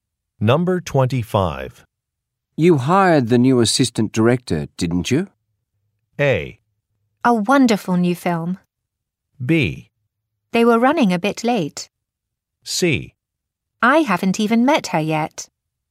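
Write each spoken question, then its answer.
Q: You hired the new assistant director, didn't you?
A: C: I haven't even met her yet.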